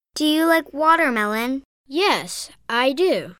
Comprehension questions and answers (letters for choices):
«با توجه به فایل صوتی گزینه مناسب را انتخاب کنید»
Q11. Does he like watermelon?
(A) Yes, he likes watermelon.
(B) No, he doesn't like watermelon.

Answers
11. A